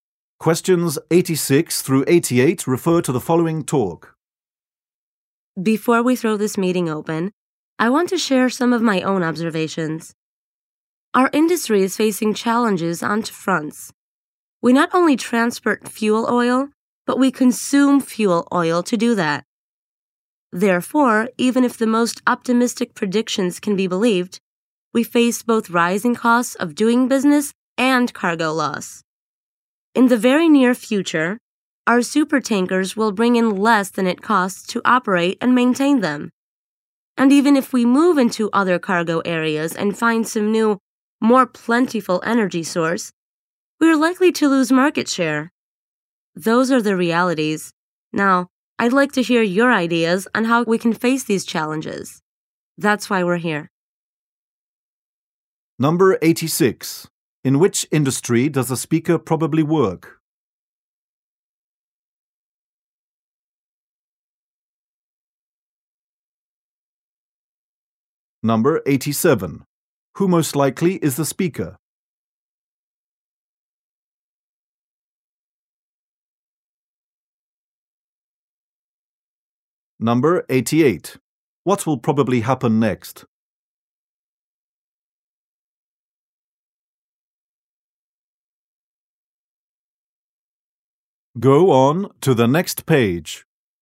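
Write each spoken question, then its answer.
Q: In which industry does the speaker probably work?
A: Oil shipping

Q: What will probably happen next?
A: The audience will share their ideas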